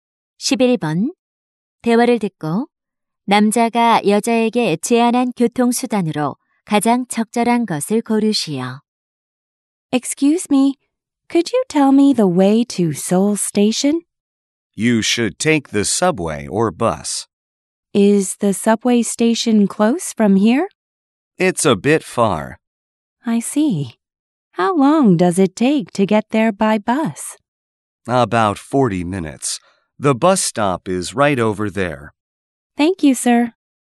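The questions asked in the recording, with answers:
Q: 대화를 듣고 남자가 여자에게 제안한 교통수단으로 가장 적절한 것을 고르시오.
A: 버스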